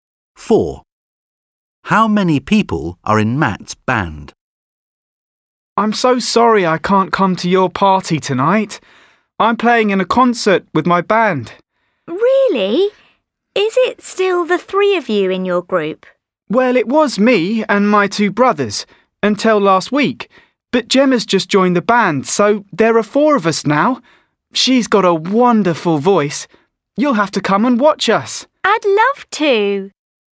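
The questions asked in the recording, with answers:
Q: How many people are in Matt's band?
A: Four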